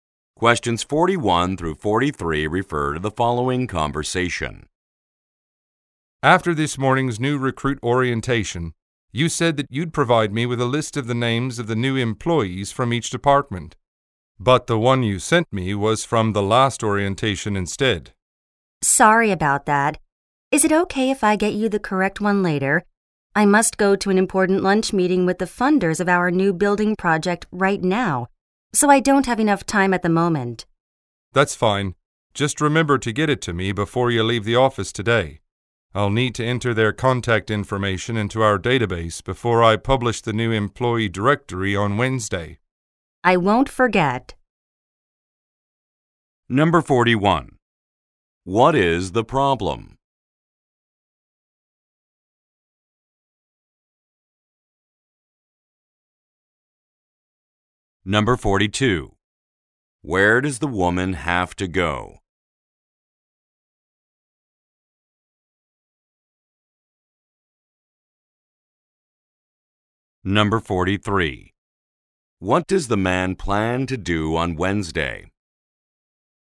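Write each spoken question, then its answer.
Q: What is the problem?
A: The wrong list of new employees was sent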